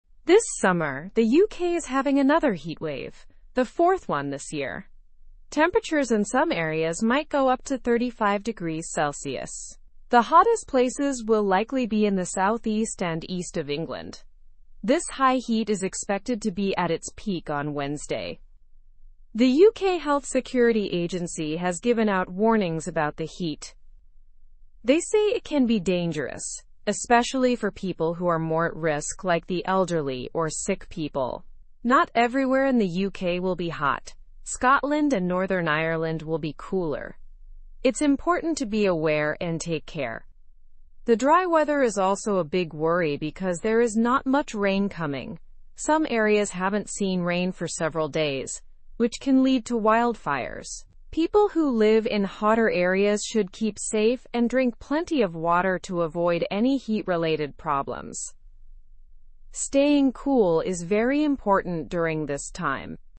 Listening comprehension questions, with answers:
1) What event is the UK experiencing?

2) How high could temperatures get in some areas?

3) Where will the hottest areas be?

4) What agency issued warnings about the heat?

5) Which parts of the UK will not feel the heat as much?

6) Why is the dry weather a concern?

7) What should people in hot areas do to stay safe?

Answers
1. The UK is experiencing its fourth heatwave this year.
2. Temperatures could reach up to 35°C in some areas.
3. The hottest areas will be in the southeast and east of England.
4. The UK Health Security Agency issued warnings about the heat.
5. Scotland and Northern Ireland will not feel the heat as much.
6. The dry weather is a concern because it increases the risk of wildfires.
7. People in hot areas should stay safe and hydrated to avoid heat-related illnesses.

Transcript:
This summer, the UK is having another heatwave, the fourth one this year. Temperatures in some areas might go up to 35 degrees Celsius. The hottest places will likely be in the southeast and east of England. This high heat is expected to be at its peak on Wednesday.
The UK Health Security Agency has given out warnings about the heat. They say it can be dangerous, especially for people who are more at risk like the elderly or sick people. Not everywhere in the UK will be hot; Scotland and Northern Ireland will be cooler. It's important to be aware and take care.
The dry weather is also a big worry because there is not much rain coming. Some areas haven't seen rain for several days, which can lead to wildfires. People who live in hotter areas should keep safe and drink plenty of water to avoid any heat-related problems. Staying cool is very important during this time.

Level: Level 2